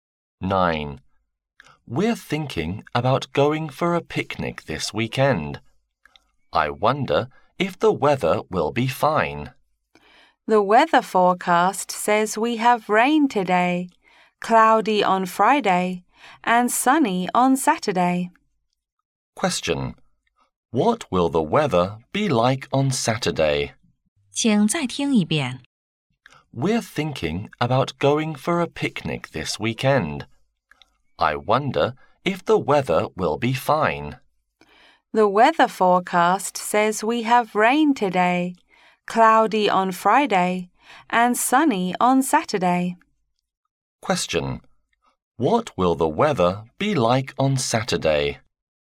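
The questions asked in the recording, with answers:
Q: What will the weather be like on Saturday?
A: Sunny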